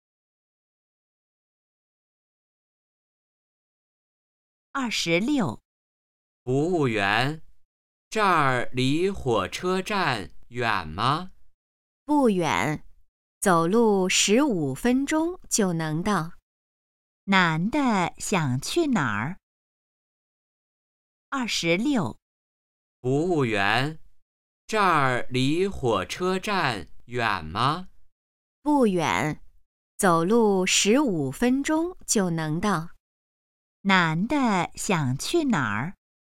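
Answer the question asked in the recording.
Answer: 火车站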